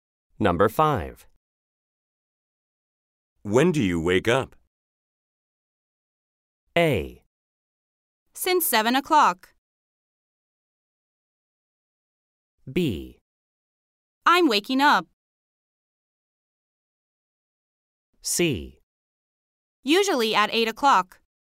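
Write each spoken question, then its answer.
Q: When do you wake up?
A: C: Usually at 8 o'clock.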